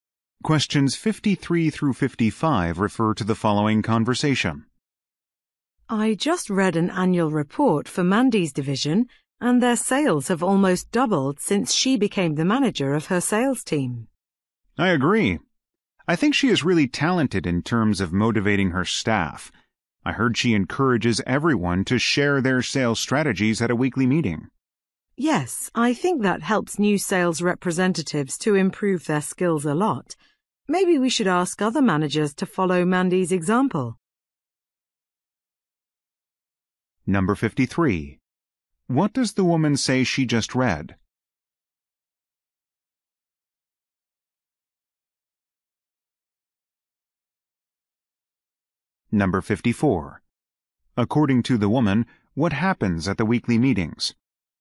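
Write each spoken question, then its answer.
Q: According to the woman, what happens at the weekly meetings?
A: Staff share their sales strategies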